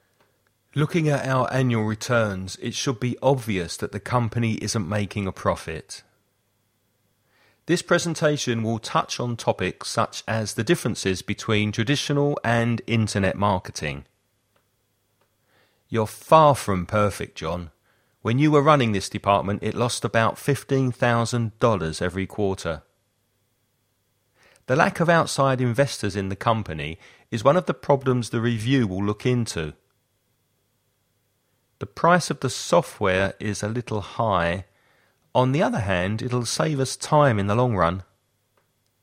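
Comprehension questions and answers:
Write ONE missing word in each gap to complete the sentences. Follow the example.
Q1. Looking at our annual returns, it should obvious that the company isn't making a profit.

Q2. This presentation will touch on topics as the differences between traditional and internet marketing.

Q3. You're from perfect, John. When you were running this department it lost about $15,000 every quarter.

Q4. The lack of outside investors in the company is one of the problems the review will into.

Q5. The price of the software is a little high. On the hand, it'll save us time in the long run.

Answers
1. be
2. such
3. far
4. look
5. other

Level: Avanzado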